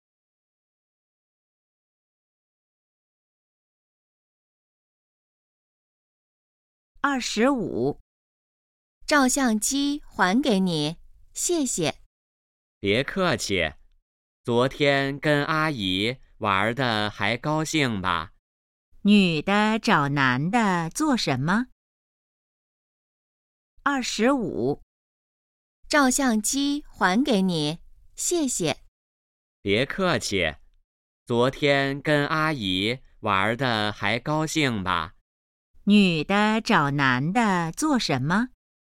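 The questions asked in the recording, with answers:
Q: 女的找男的做什么?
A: 还照相机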